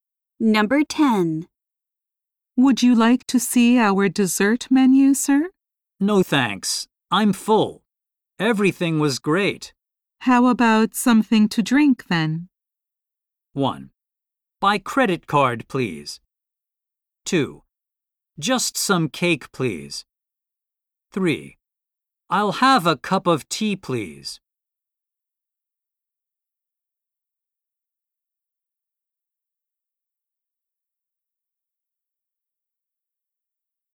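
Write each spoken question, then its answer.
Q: How about something to drink, then?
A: 3: I'll have a cup of tea, please.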